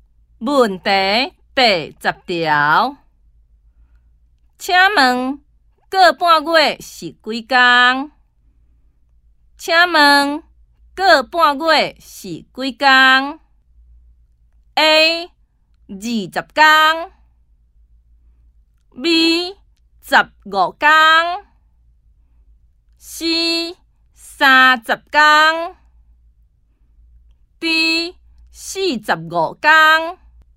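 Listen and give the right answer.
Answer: B: 十五天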